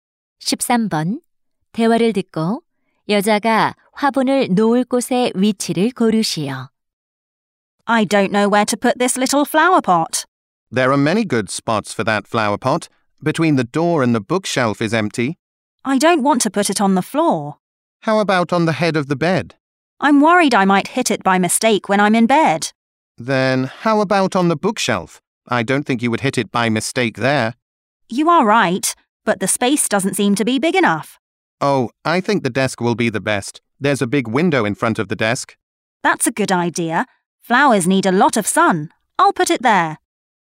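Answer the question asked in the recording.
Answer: 책상 위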